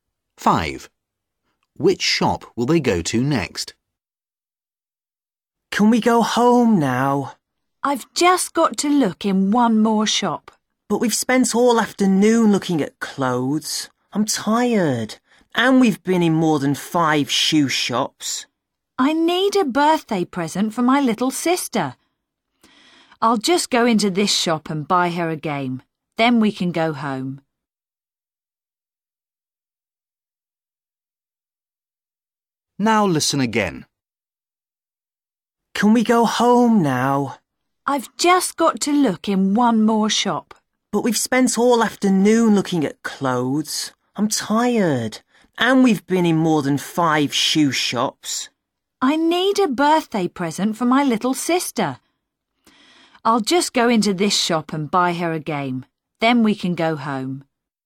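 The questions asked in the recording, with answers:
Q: Which shop will they go to next?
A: a shop that sells games (toy shop)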